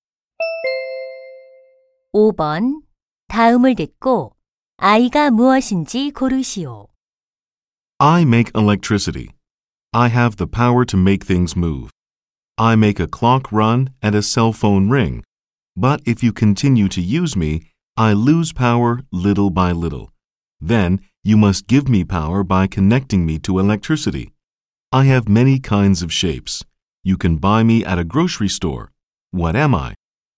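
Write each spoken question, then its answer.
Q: 다음을 듣고 아이가 무엇인지 고르시오.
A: 건전지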